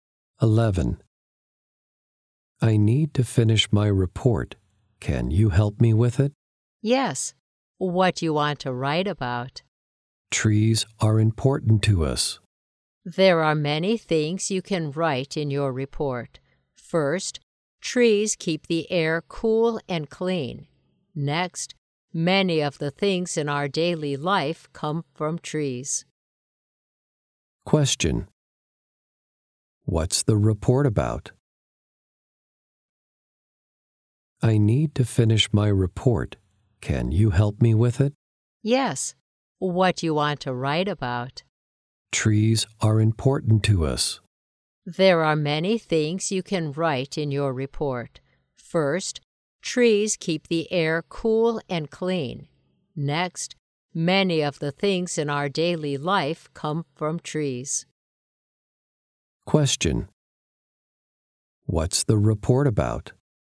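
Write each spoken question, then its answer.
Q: What's the report about?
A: Why trees are important to us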